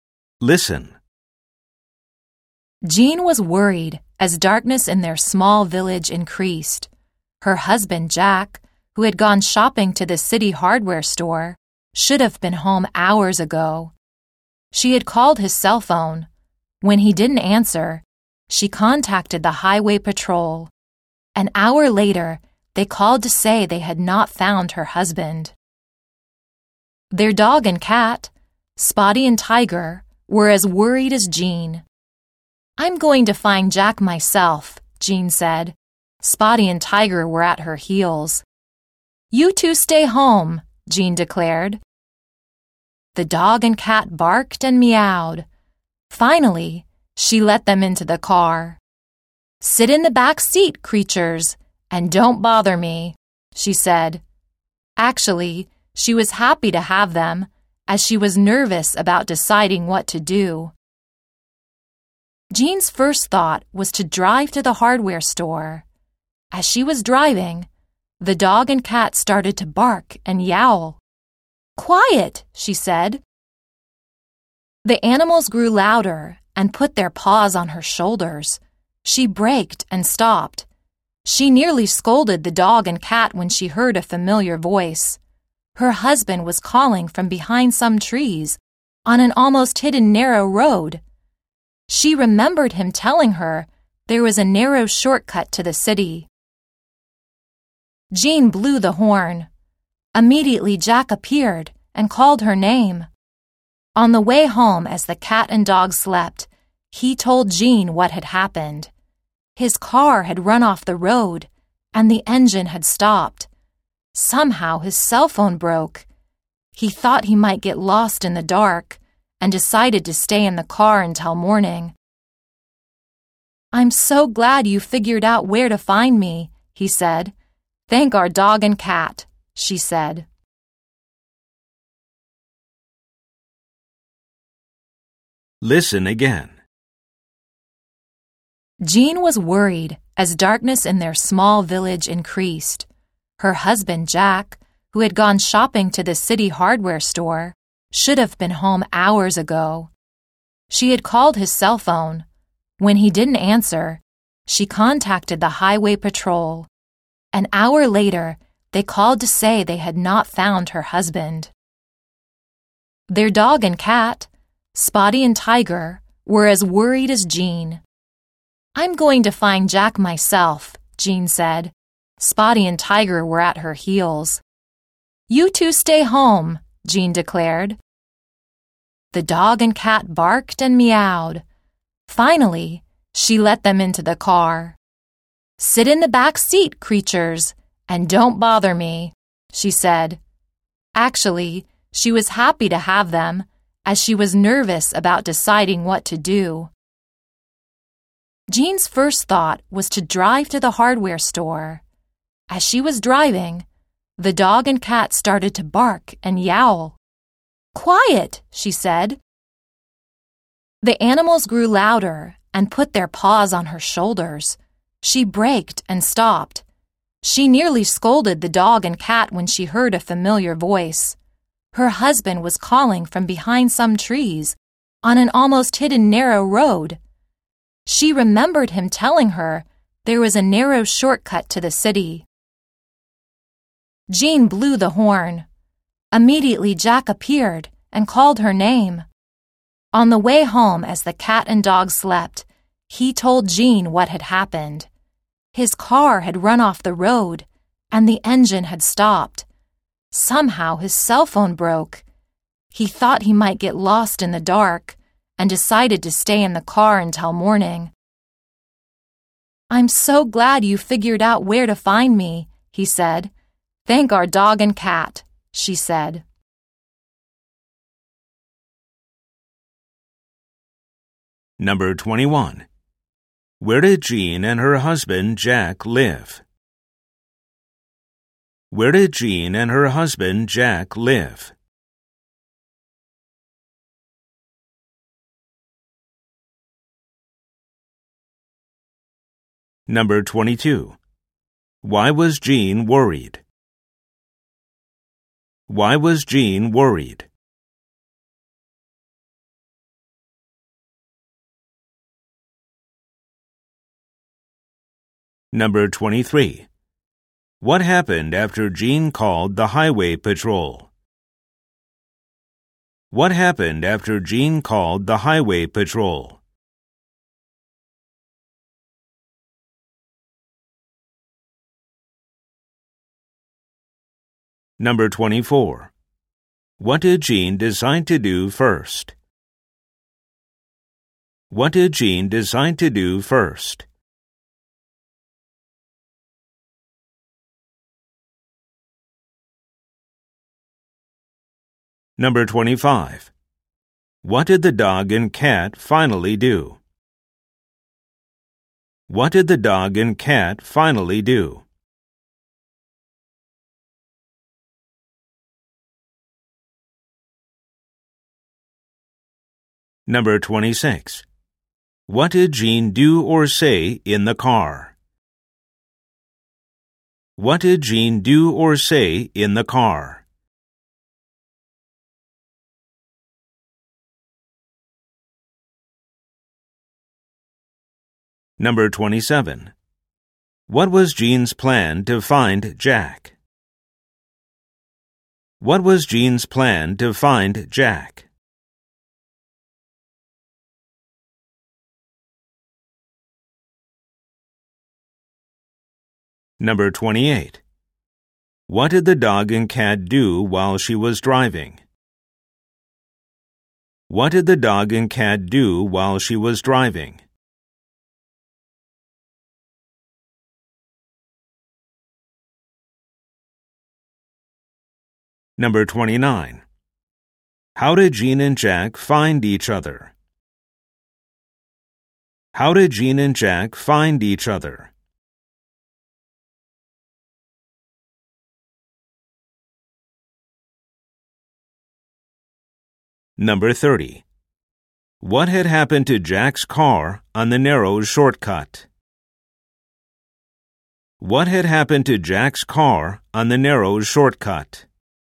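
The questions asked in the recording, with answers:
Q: Where did Jean and her husband Jack live?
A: In a small village

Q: Why was Jean worried?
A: Her husband Jack should have been home from the city hardware store hours ago

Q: What happened after Jean called the highway patrol?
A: An hour later they called to say they had not found her husband

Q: What did Jean do or say in the car?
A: She told them to sit in the back seat and not bother her

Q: What was Jean's plan to find Jack?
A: To drive to the hardware store

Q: What did the dog and cat do while she was driving?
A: They barked and yowled and put their paws on her shoulders

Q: How did Jean and Jack find each other?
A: She heard him calling from behind some trees and blew the horn

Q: What had happened to Jack's car on the narrow shortcut?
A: It ran off the road and the engine stopped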